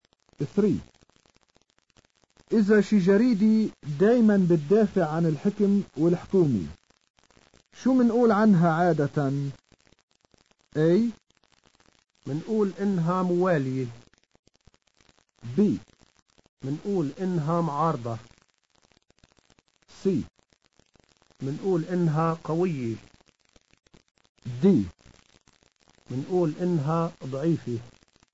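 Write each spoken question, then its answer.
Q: إذا شي جريدي دايما بتدافع عن الحكم والحكومي شو منقول عنها عادة؟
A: A: منقول إنها موالية.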